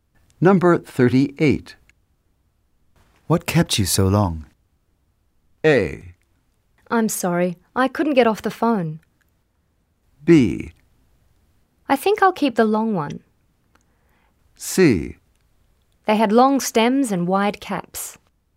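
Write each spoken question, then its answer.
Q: What kept you so long?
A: A: I'm sorry, I couldn't get off the phone.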